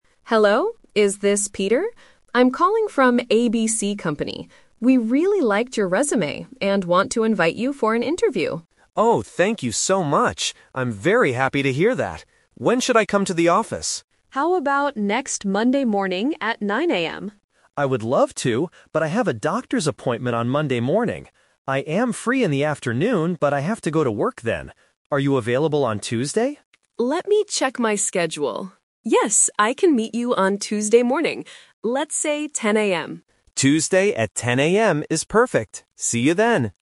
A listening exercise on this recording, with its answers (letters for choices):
Listen to the conversation and choose the correct answer (A, B, or C).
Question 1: Why is Ms. Davis calling Peter?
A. To ask him for his resume.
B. To invite him for an interview.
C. To offer him a new job.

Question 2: Why can't Peter meet on Monday morning?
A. He has to go to work.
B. He has another interview.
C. He has a doctor's appointment.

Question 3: When is the job interview?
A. Monday at 9:00 AM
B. Tuesday at 10:00 AM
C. Wednesday at 10:00 AM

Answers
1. B
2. C
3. B

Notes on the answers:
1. Ms. Davis says, "We really liked your resume and want to invite you for an interview." Option (A) is a trap because the word "resume" is mentioned, but she already has it. Option (C) is a plausible reason for HR to call, but she is only scheduling an interview, not offering a job yet.
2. Peter says he cannot meet on Monday morning because he has a "doctor's appointment." Option (A) is a trap because he has to go to work in the afternoon, not the morning. Option (B) is not mentioned in the audio.
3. They finally agree on Tuesday at 10:00 AM. Option (A) is a trap because 9:00 AM on Monday is Ms. Davis's first suggestion, but Peter is busy. Option (C) is plausible but not mentioned.

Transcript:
Davis: Hello, is this Peter? I'm calling from ABC Company. We really liked your resume and want to invite you for an interview.
Peter: Oh, thank you so much! I'm very happy to hear that. When should I come to the office?
Ms. Davis: How about next Monday morning at 9:00 AM?
Peter: I would love to, but I have a doctor's appointment on Monday morning. I am free in the afternoon, but I have to go to work then. Are you available on Tuesday?
Davis: Let me check my schedule... Yes, I can meet you on Tuesday morning.